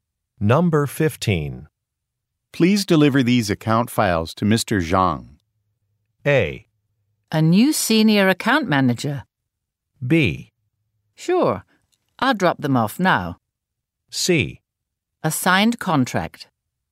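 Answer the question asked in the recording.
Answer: B: Sure. I'll drop them off now.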